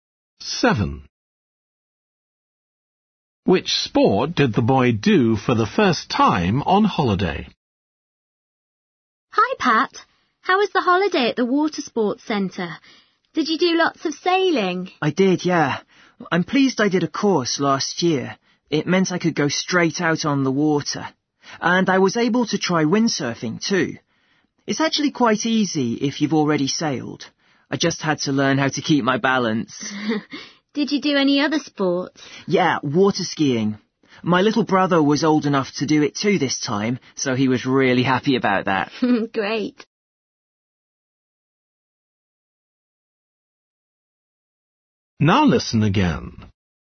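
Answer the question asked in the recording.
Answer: windsurfing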